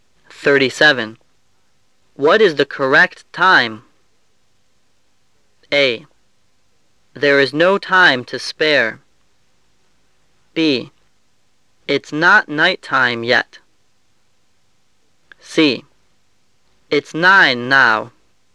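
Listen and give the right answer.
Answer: C: It's 9 now.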